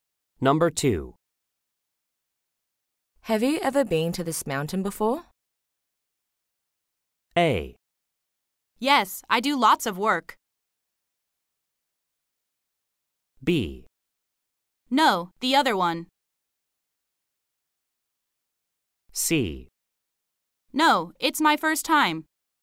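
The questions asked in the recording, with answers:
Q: Have you ever been to this mountain before?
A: C: No, it's my first time.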